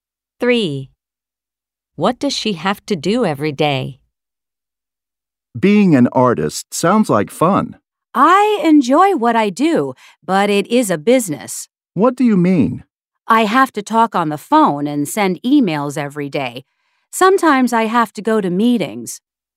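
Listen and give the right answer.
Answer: Talk on the phone and send emails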